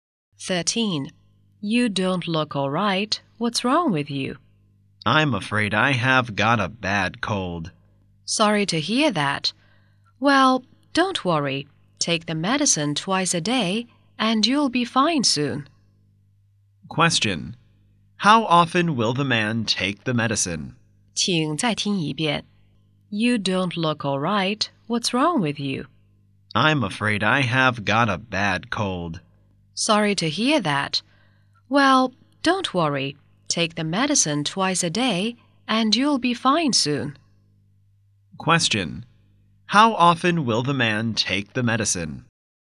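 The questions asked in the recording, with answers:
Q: How often will the man take the medicine?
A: Twice a day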